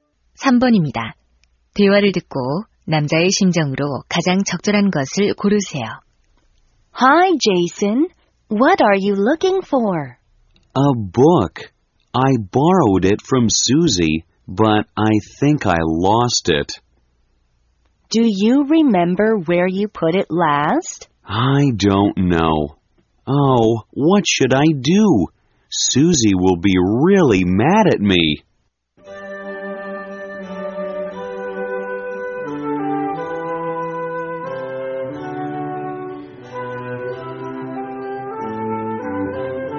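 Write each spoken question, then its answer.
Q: 대화를 듣고 남자의 심정으로 가장 적절한 것을 고르세요.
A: 걱정스러움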